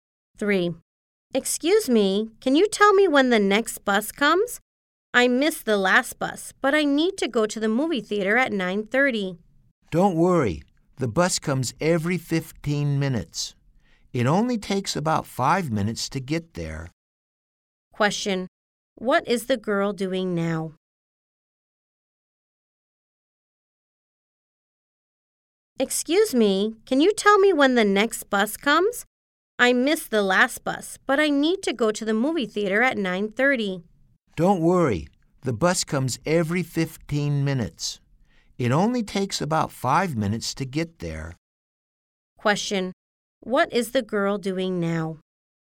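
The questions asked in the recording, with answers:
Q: What is the girl doing now?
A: Waiting for the bus.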